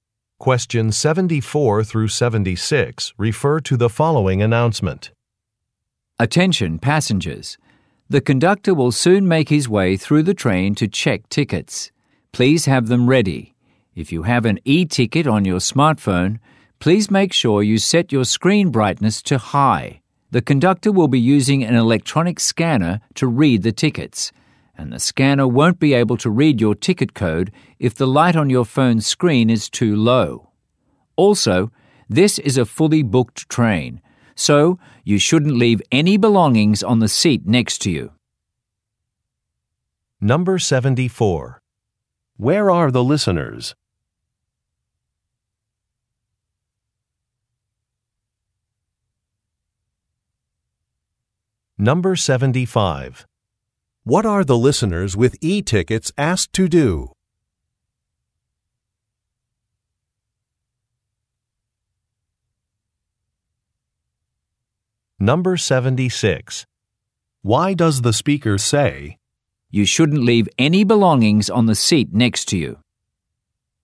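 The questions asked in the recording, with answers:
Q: Where are the listeners?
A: On a train

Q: What are the listeners with e-tickets asked to do?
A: Set their phone screen brightness to high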